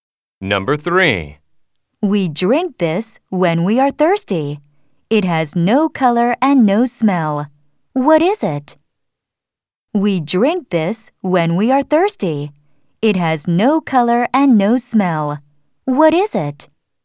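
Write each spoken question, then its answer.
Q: What is it?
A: water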